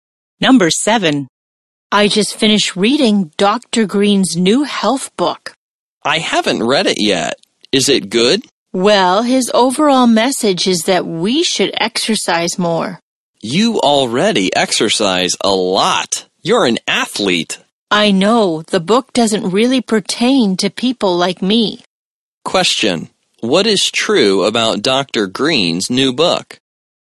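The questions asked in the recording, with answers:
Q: What is true about Dr. Green's new book?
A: Its message is that people should exercise more.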